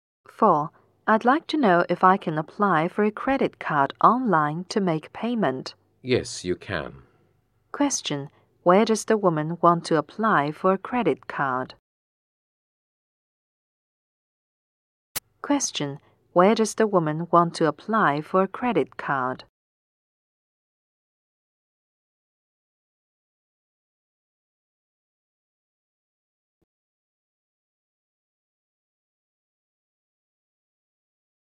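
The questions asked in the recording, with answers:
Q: Where does the woman want to apply for a credit card?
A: Online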